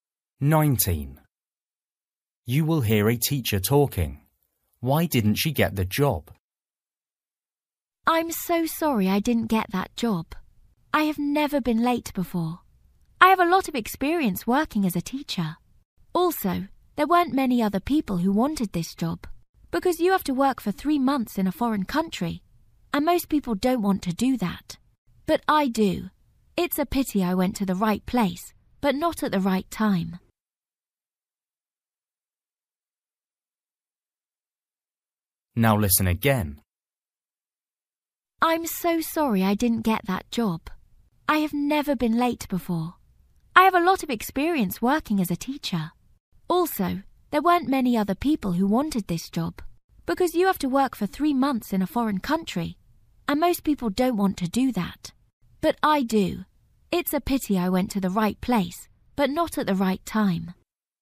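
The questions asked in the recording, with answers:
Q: Why didn't she get the job?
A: She was late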